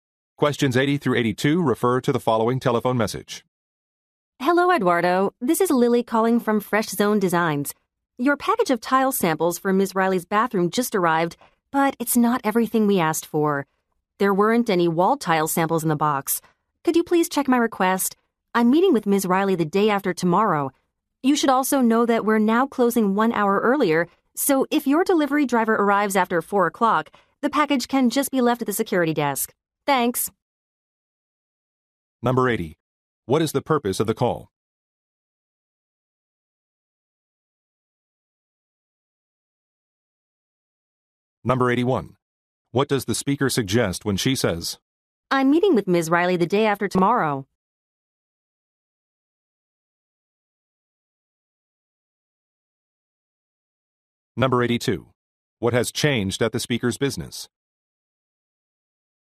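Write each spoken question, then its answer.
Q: What is the purpose of the call?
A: To report that wall tile samples were missing from a package

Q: I'm meeting with Ms. Riley the day after tomorrow?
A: She needs the missing samples soon

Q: What has changed at the speaker's business?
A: It closes one hour earlier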